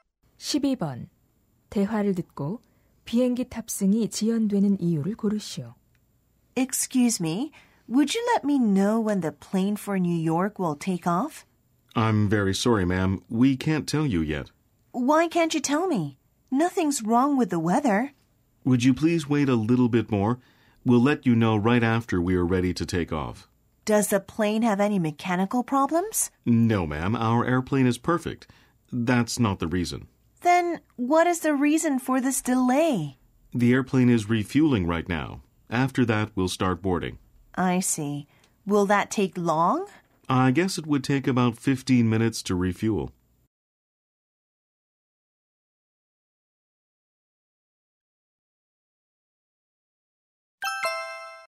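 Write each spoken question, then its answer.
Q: 대화를 듣고 비행기 탑승이 지연되는 이유를 고르시오.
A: 비행기 연료 보급 중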